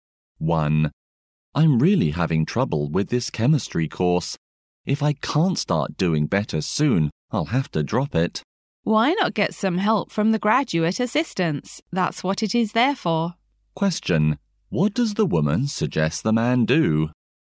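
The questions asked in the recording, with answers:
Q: What does the woman suggest the man do?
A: Get help from the graduate assistants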